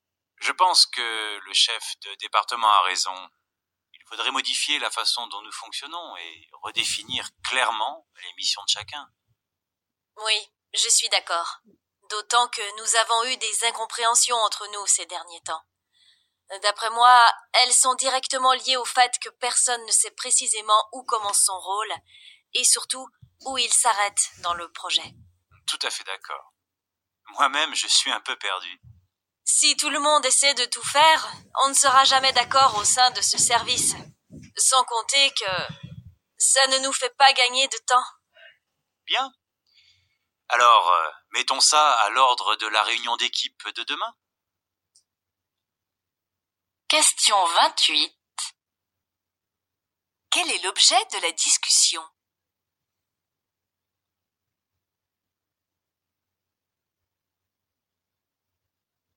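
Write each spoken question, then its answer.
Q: Quel est l'objet de la discussion ?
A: Redéfinir clairement les missions de chacun dans le service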